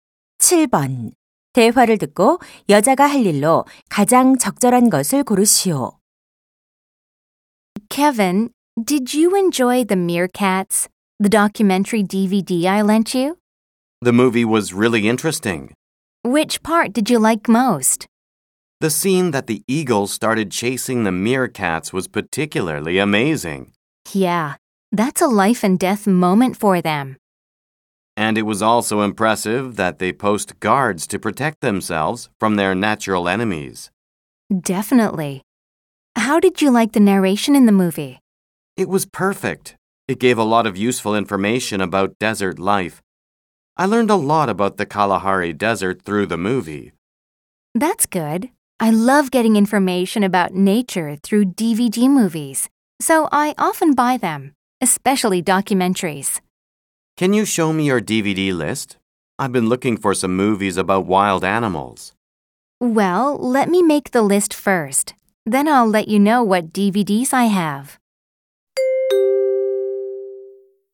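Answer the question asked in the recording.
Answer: DVD 목록 만들기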